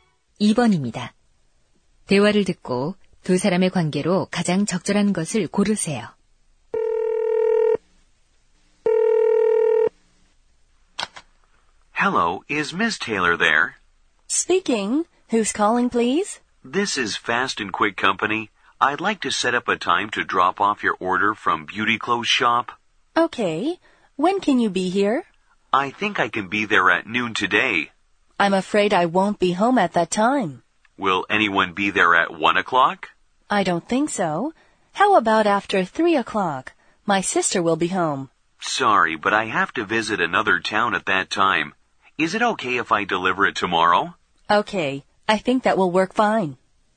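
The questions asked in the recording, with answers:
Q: 대화를 듣고 두 사람의 관계로 가장 적절한 것을 고르세요.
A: 배달원과 고객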